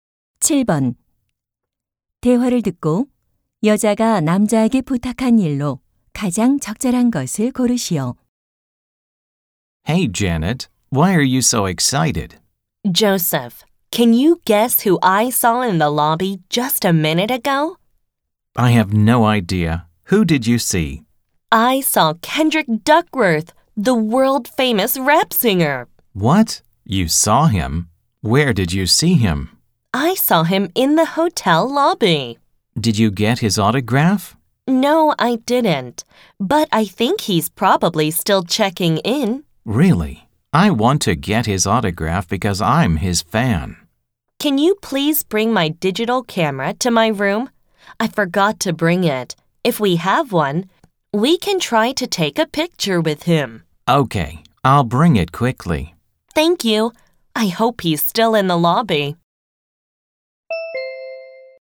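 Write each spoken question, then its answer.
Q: 대화를 듣고 여자가 남자에게 부탁한 일로 가장 적절한 것을 고르시오.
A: 디지털 카메라를 방으로 가져다주기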